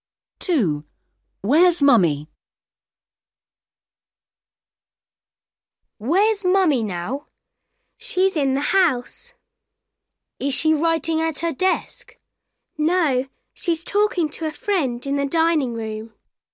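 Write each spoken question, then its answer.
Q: Where's Mummy?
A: in the dining room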